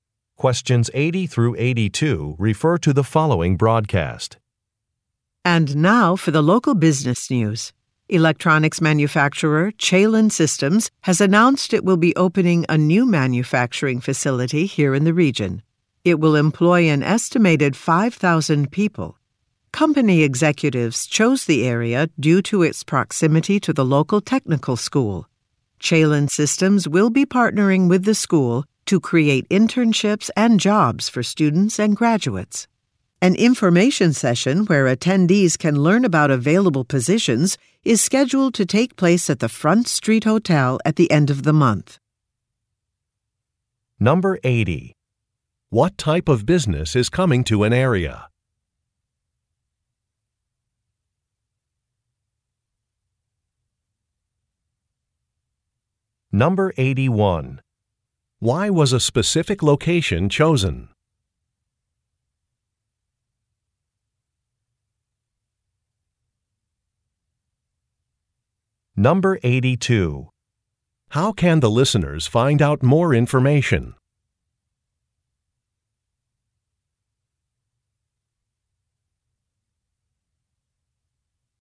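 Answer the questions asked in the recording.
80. An electronics manufacturer
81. It is close to the local technical school
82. By going to an information session at the Front Street Hotel at the end of the month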